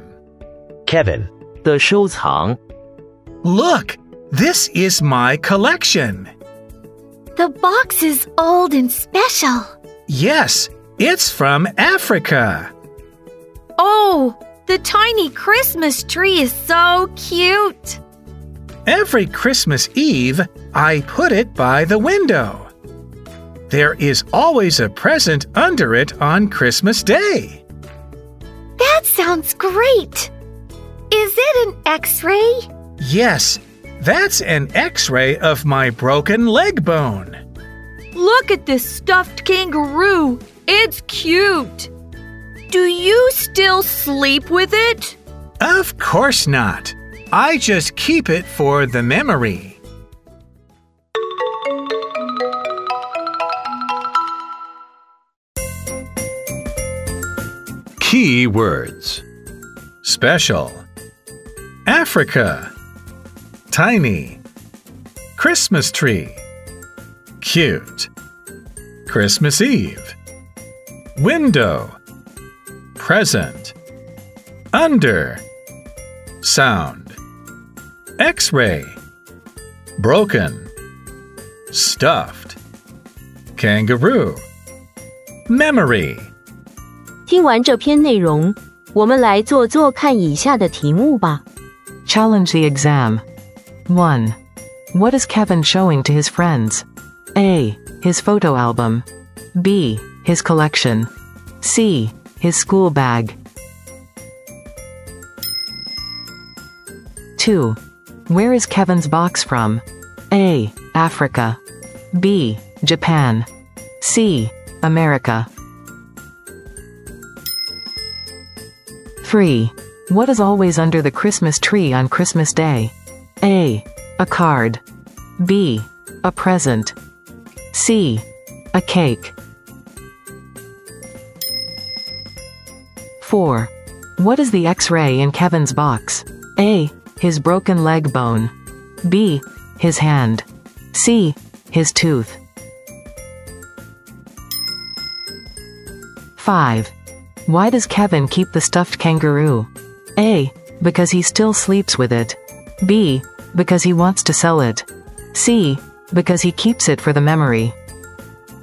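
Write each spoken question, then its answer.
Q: What is Kevin showing to his friends?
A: B: His collection.

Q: Where is Kevin's box from?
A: A: Africa.

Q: What is always under the Christmas tree on Christmas Day?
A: B: A present.

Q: What is the X-ray in Kevin's box?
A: A: His broken leg bone.

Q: Why does Kevin keep the stuffed kangaroo?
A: C: Because he keeps it for the memory.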